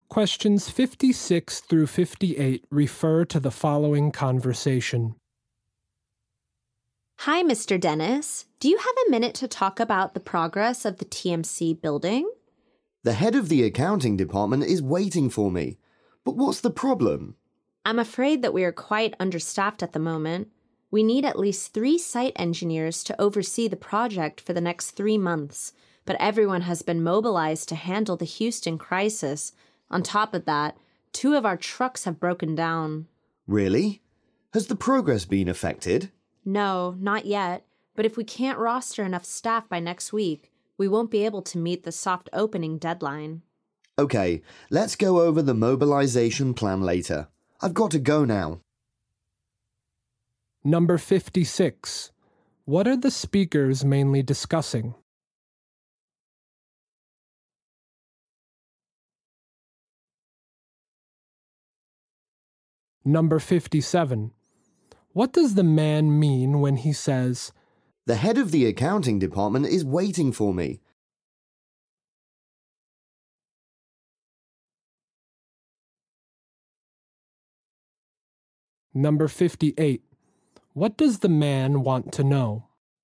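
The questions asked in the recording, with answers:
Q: What are the speakers mainly discussing?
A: Staff shortages and problems on the TMC building project

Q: What does the man mean when he says, "The head of the accounting department is waiting for me"?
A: He doesn't have much time to talk

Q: What does the man want to know?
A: Whether the project's progress has been affected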